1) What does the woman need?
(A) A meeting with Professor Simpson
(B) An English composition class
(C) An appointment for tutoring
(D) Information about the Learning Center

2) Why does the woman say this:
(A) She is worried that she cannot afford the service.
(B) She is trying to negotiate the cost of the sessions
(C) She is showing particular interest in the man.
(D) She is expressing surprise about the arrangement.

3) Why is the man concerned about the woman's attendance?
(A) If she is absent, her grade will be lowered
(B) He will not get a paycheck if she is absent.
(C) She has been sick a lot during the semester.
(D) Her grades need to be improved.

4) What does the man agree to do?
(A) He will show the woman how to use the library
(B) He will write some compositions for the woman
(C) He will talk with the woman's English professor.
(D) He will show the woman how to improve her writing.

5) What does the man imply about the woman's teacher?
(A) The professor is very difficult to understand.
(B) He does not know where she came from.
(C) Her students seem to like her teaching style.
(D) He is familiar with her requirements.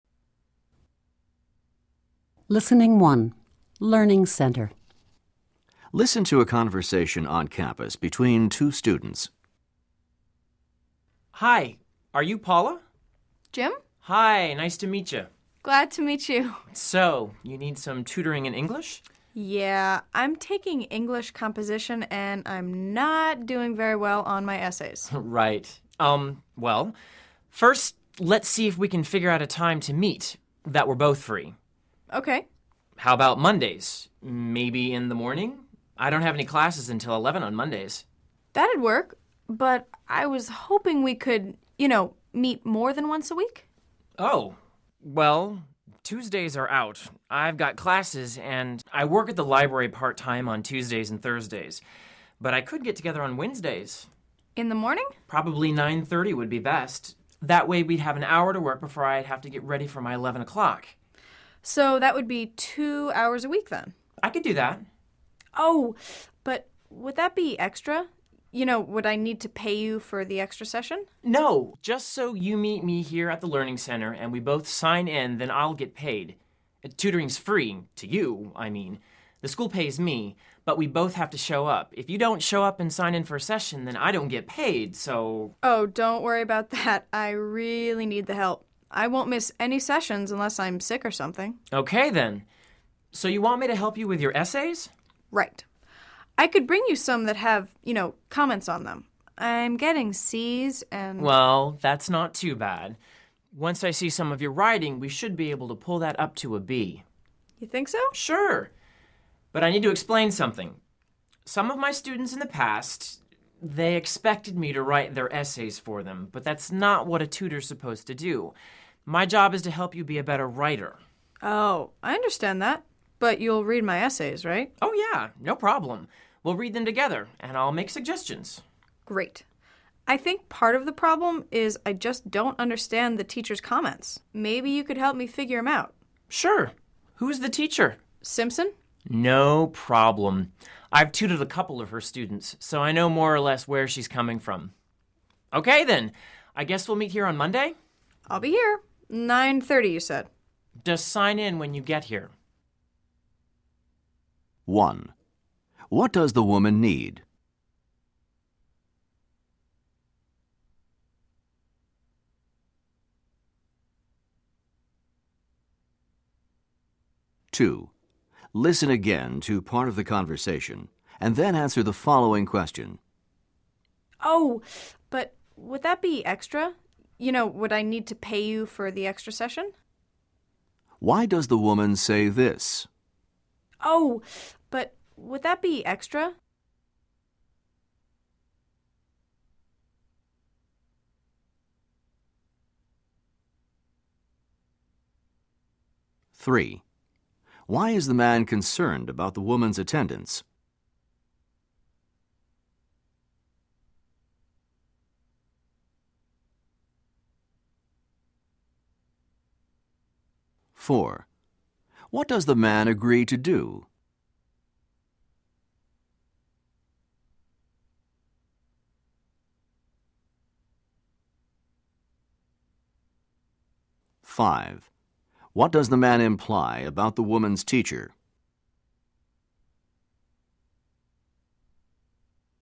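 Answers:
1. C
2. A
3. B
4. D
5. D

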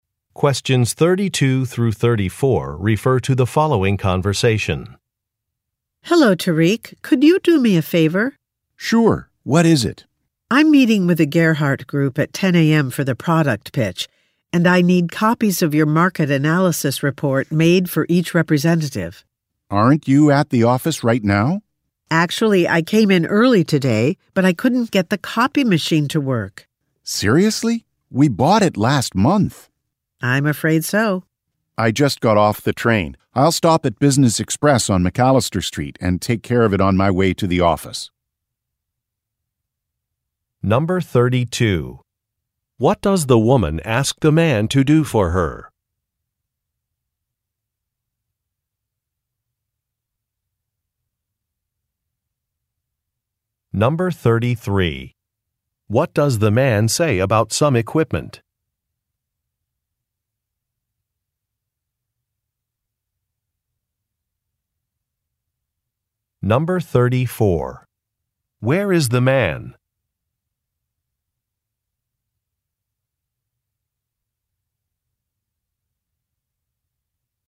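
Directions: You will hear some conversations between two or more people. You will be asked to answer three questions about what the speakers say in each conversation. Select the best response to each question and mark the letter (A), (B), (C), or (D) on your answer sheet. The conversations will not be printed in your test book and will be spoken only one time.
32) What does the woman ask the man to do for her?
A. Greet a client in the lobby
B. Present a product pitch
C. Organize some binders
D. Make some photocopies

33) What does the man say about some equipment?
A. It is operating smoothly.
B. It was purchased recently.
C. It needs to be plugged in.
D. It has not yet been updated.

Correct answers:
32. D
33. B

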